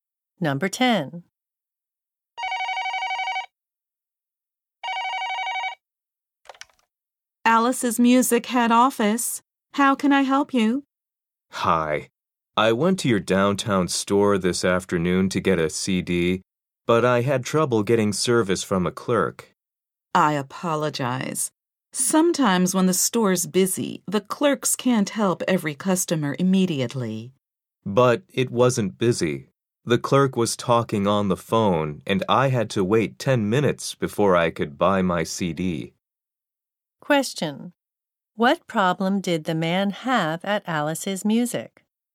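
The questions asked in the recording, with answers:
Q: What problem did the man have at Alice's Music?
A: He had to wait 10 minutes because the clerk was on the phone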